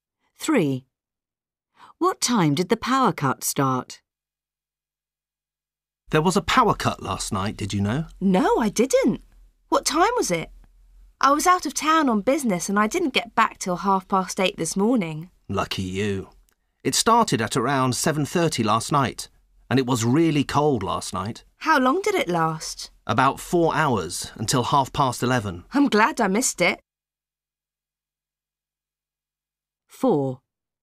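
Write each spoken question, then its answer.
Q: What time did the power cut start?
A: Around 7:30 last night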